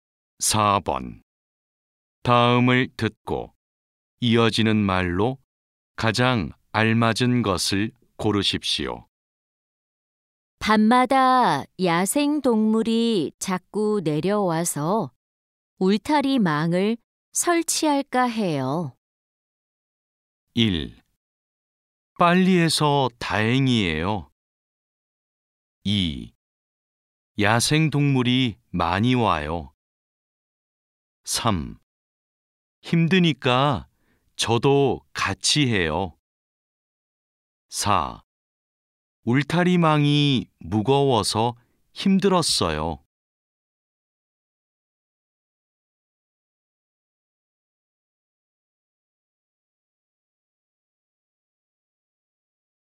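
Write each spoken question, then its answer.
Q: 다음을 듣고 이어지는 말로 가장 알맞은 것을 고르십시오.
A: 3: 힘드니까 저도 같이 해요.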